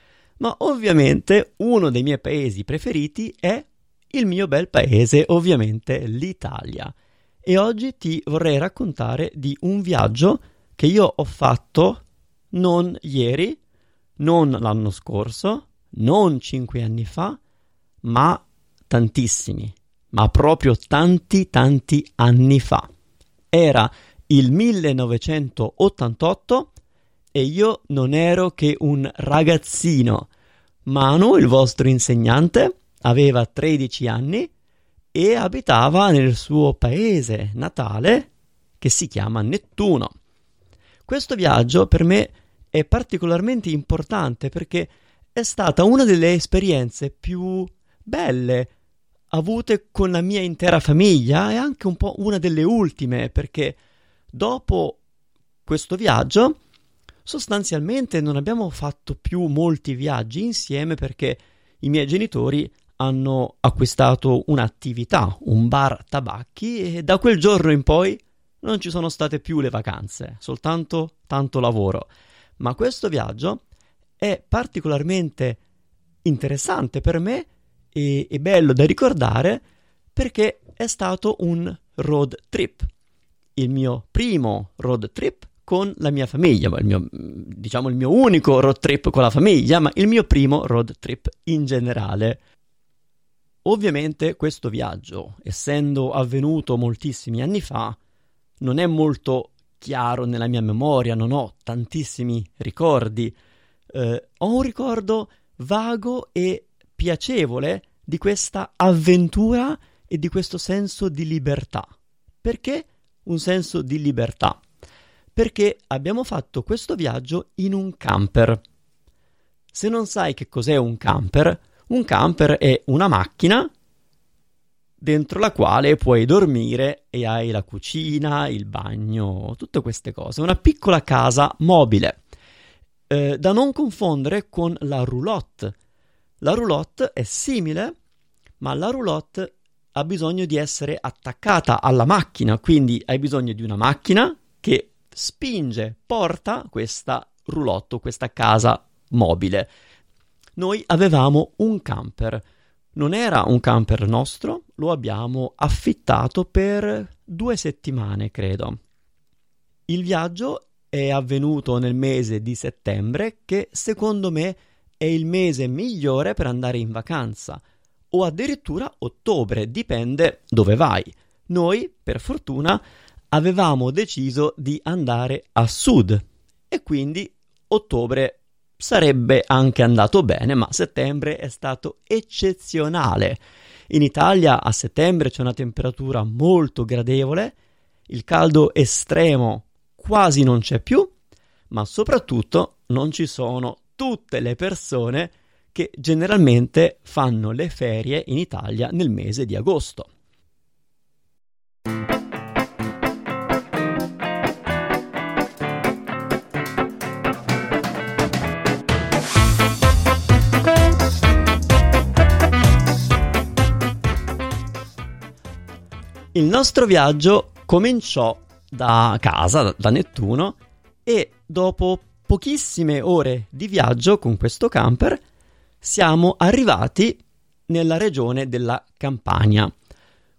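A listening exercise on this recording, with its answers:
Here are your TRUE/ FALSE Comprehension questions.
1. Manu parla di un viaggio che ha fatto l'anno scorso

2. Manu parla di un viaggio fatto con la sua famiglia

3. Manu ricorda ogni secondo di quella vacanza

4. Il viaggio è avvenuto in autunno quando faceva molto freddo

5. Manu e la sua famiglia sono partiti da Nettuno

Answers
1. Falso
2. Vero
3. Falso
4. Falso
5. Vero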